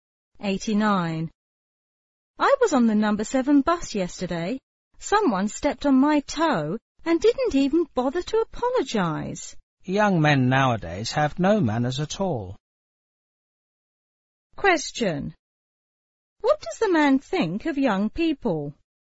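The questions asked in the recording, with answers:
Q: What does the man think of young people?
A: He thinks young men today have no manners.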